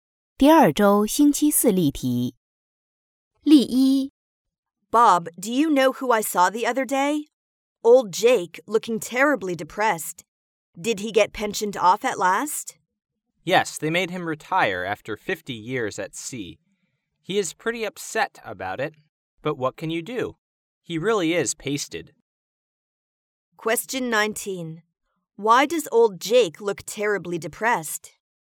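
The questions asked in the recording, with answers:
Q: Why does old Jake look terribly depressed?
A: He was made to retire after 50 years at sea.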